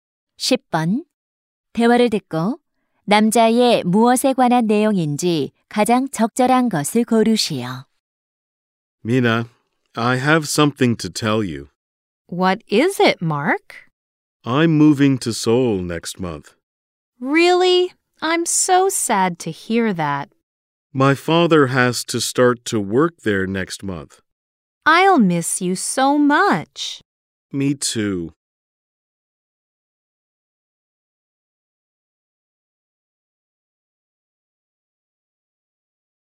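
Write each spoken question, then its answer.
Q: 대화를 듣고 남자의 무엇에 관한 내용인지 가장 적절한 것을 고르시오.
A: 이사 (서울로 이사 감)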